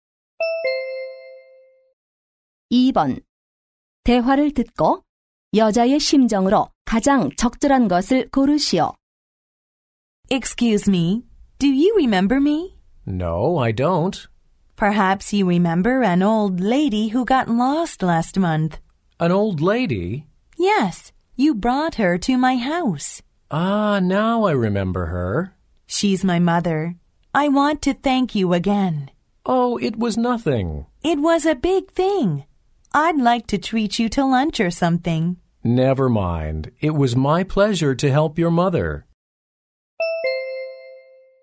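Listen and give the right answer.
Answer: 감사함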